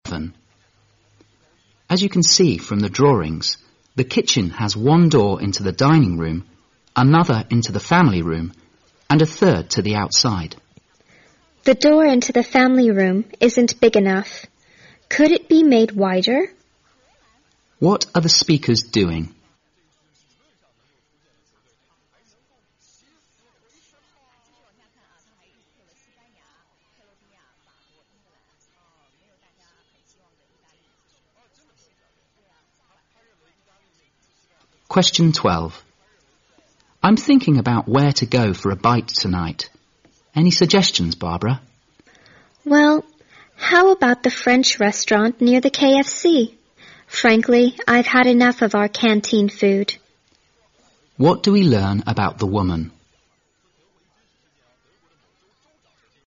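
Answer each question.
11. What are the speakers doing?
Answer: Discussing the plan (drawings) of a house, including its kitchen doors.

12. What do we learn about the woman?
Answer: She is tired of the canteen food and suggests eating at a French restaurant.

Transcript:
M:As you can see from the drawings, the kitchen has one door into the dining room, another into the family room and a third to the outside。
W:The door into the family room isn't big enough. Could it be made wider?
Q:What are the speakers doing?
M:I'm thinking about where to go for a bite tonight. Any suggestions, Barbara?
W:Well, how about the French restaurant near the KFC? Frankly, I've had enough of our canteen food。
Q:What do we learn about the woman?

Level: 大学英语四级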